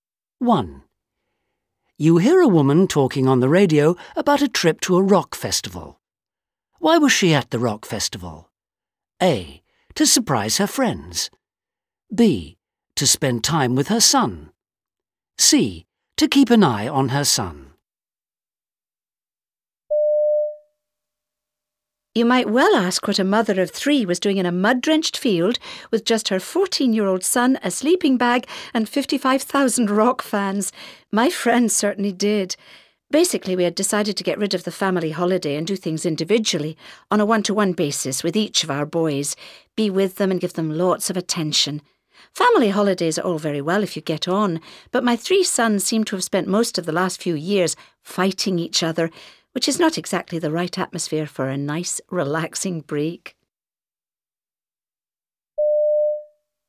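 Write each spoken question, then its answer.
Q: Why was she at the rock festival?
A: B: To spend time with her son.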